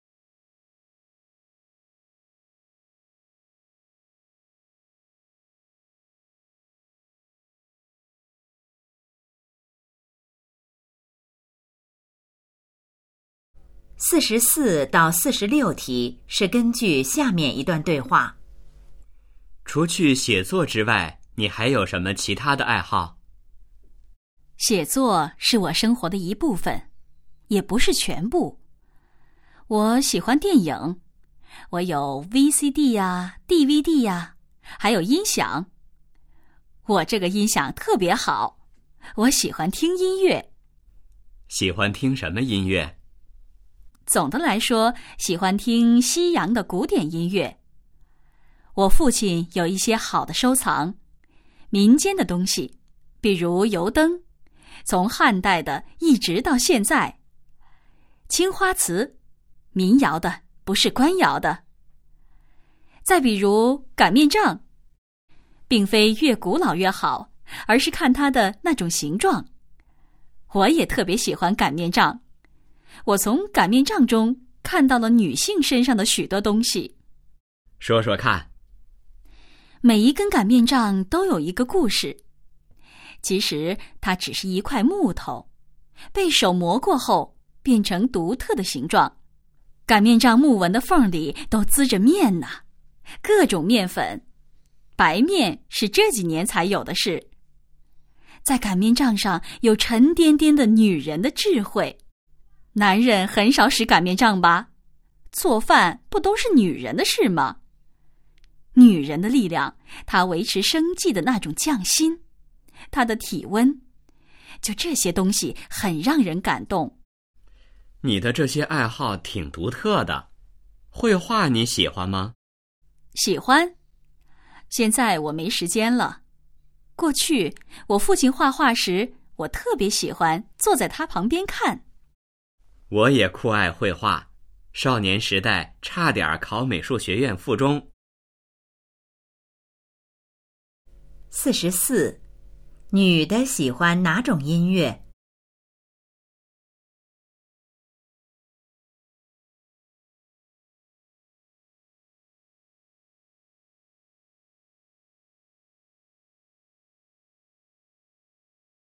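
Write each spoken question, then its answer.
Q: 女的喜欢哪种音乐?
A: 西洋古典音乐

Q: 擀面杖是做什么用的?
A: 擀面

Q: 男的和女的有什么共同爱好?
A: 绘画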